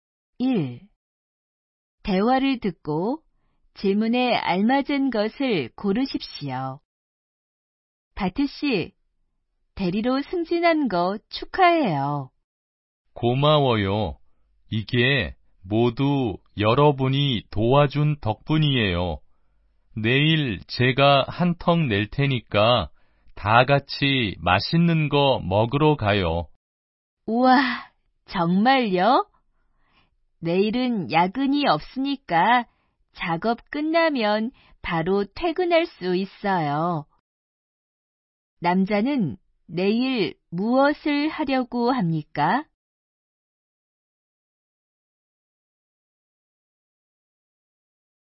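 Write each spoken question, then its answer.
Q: 남자는 내일 무엇을 하려고 합니까?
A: 동료들에게 한턱 내서 같이 맛있는 것을 먹으러 가려고 합니다.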